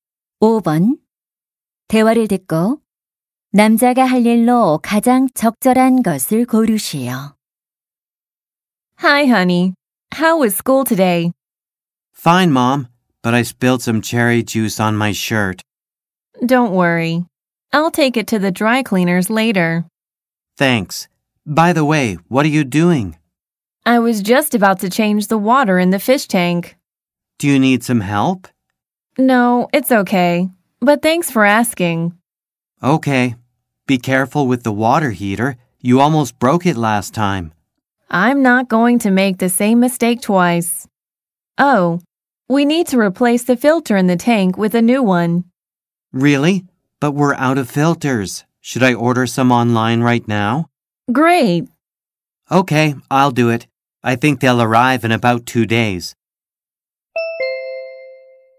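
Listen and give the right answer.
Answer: 어항 필터를 온라인으로 주문하기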